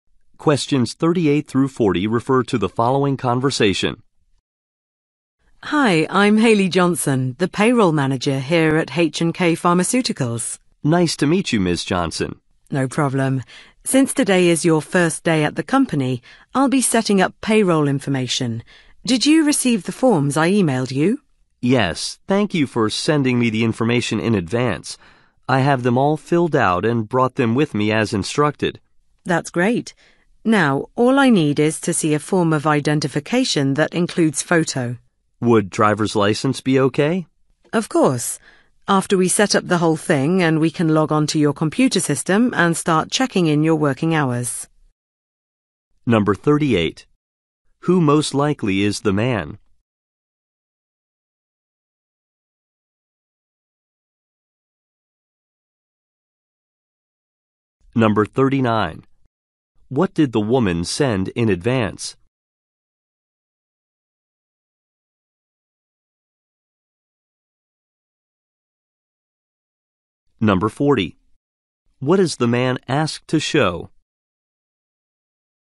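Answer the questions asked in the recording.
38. A new employee
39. Forms (payroll information)
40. Photo identification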